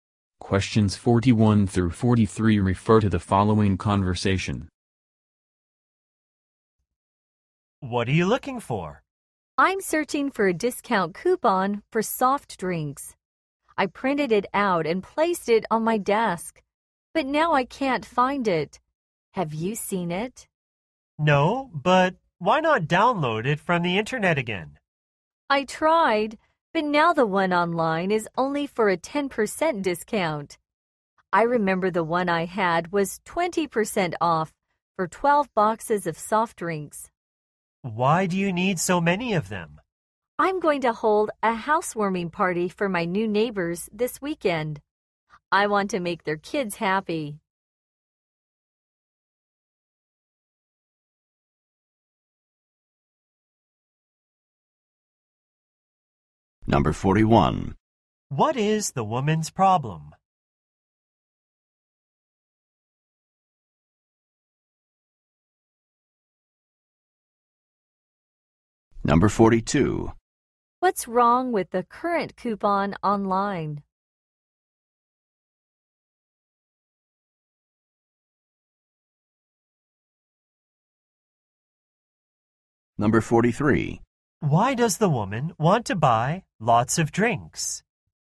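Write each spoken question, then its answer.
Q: What is the woman's problem?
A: She can't find her discount coupon

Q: What's wrong with the current coupon online?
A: It is only for a 10% discount

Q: Why does the woman want to buy lots of drinks?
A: For a housewarming party for her new neighbors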